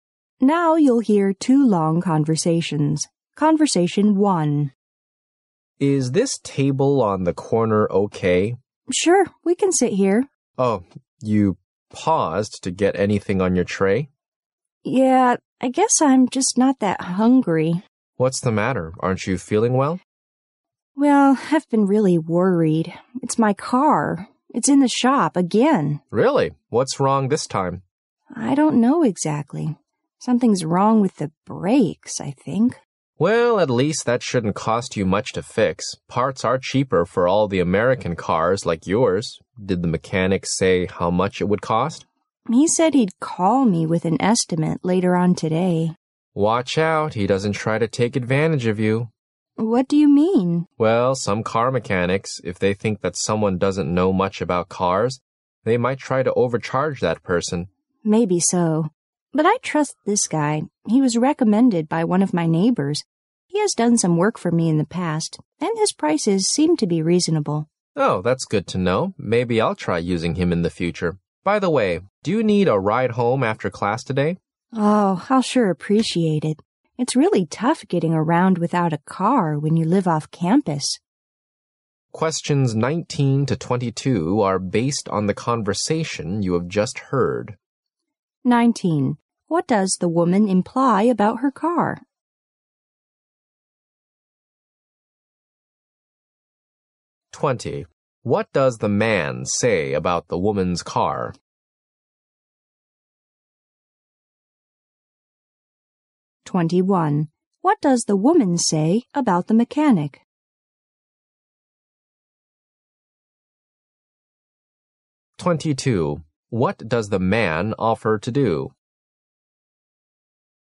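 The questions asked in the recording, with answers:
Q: What does the man say about the woman's car?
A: Parts are cheap because it's an American car, so it shouldn't cost much to fix

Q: What does the woman say about the mechanic?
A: She trusts him; a neighbor recommended him and his prices are reasonable

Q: What does the man offer to do?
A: Give her a ride home after class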